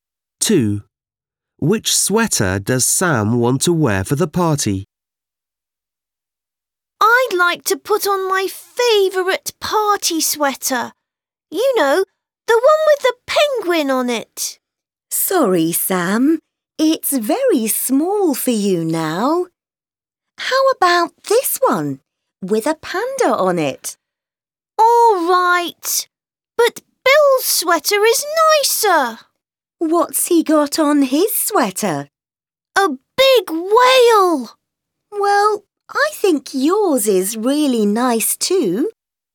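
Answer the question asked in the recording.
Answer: The one with a panda on it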